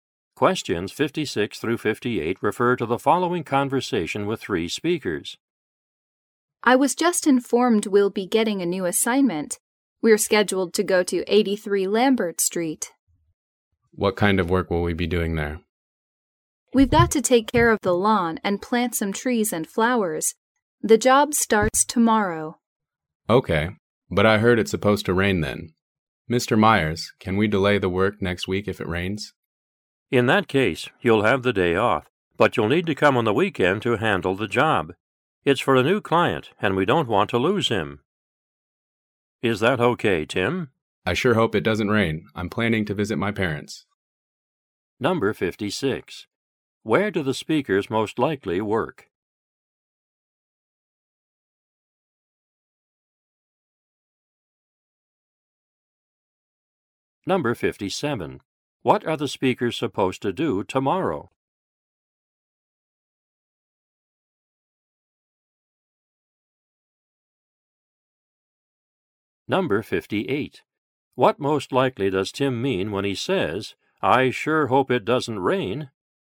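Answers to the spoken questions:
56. A landscaping company
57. Take care of a lawn and plant trees and flowers
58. He doesn't want to work on the weekend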